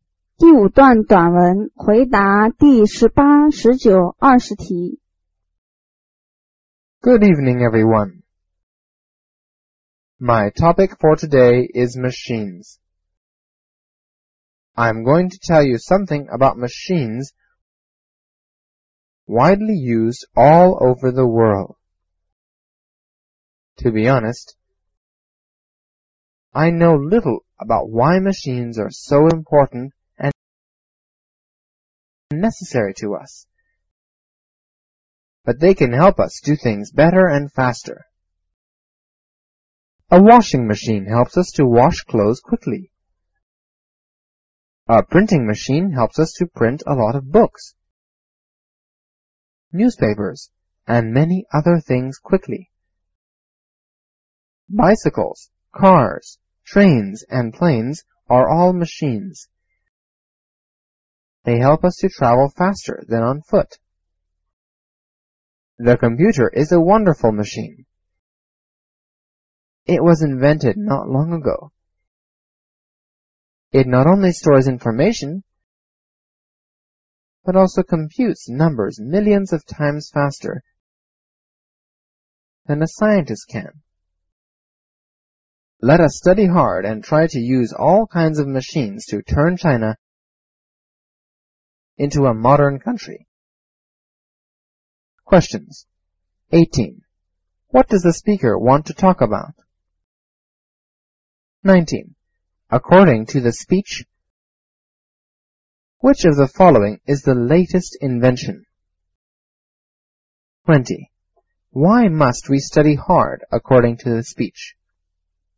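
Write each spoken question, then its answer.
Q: What does the speaker want to talk about?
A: Machines

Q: According to the speech, which of the following is the latest invention?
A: The computer

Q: Why must we study hard according to the speech?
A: To use all kinds of machines to turn China into a modern country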